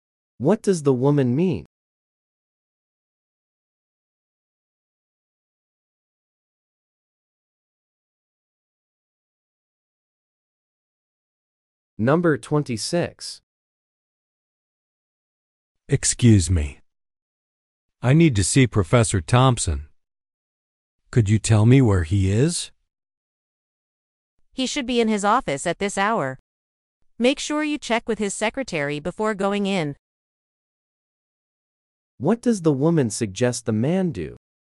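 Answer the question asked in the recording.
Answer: Check with the professor's secretary first.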